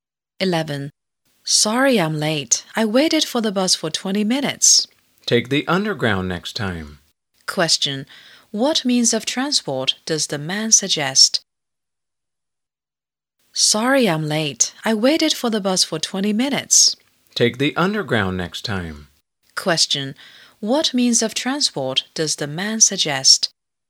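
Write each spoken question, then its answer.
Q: What means of transport does the man suggest?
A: The underground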